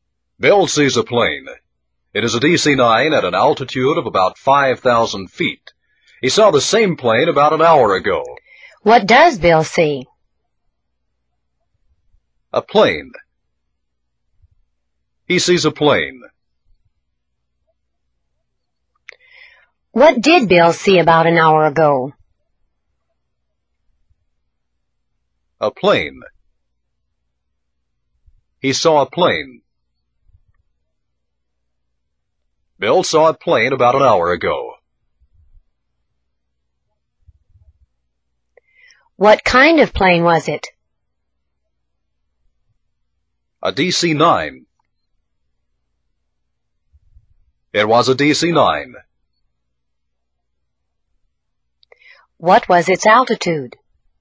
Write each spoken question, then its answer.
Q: What does Bill see?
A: A plane. He sees a plane.

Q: What did Bill see about an hour ago?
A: A plane. He saw a plane. Bill saw a plane about an hour ago.

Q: What was its altitude?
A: 5,000 feet. Its altitude was 5,000 feet.